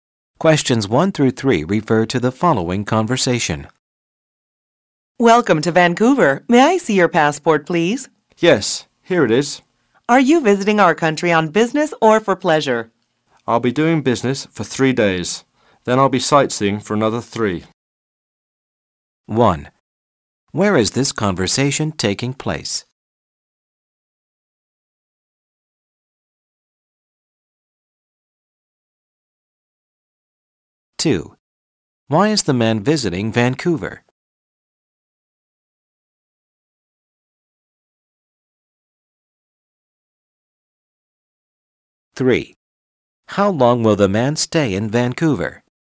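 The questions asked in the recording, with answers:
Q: Where is this conversation taking place?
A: At passport control in Vancouver

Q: Why is the man visiting Vancouver?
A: For business and sightseeing

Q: How long will the man stay in Vancouver?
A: Six days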